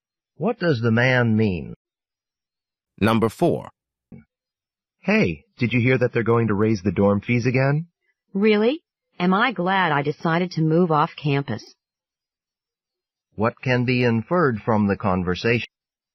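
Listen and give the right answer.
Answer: The man moved off campus and is glad he won't pay the higher dorm fees.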